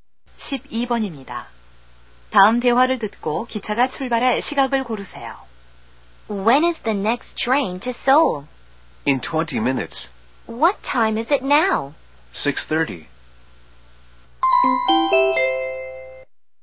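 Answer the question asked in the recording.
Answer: 6시 50분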